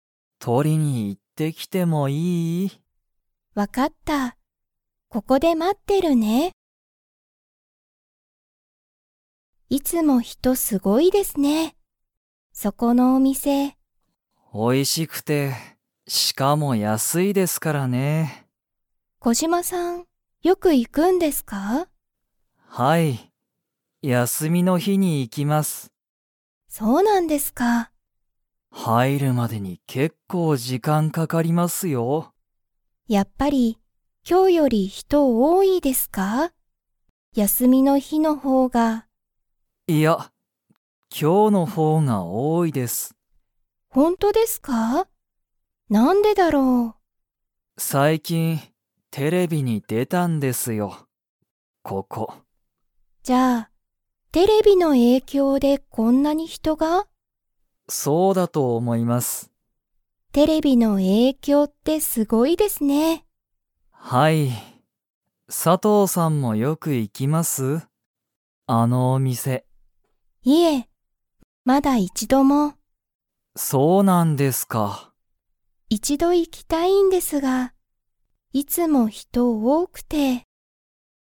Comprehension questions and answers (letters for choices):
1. そのお店みせは、____で人ひとが多おおい。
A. テレビの影響えいきょう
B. まだ一度いちど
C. 結構時間けっこうじかん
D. 休やすみの日ひ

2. 佐藤さとうさんは、そのお店みせによく行いきますか?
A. はい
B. いいえ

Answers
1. A
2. B

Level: Level 2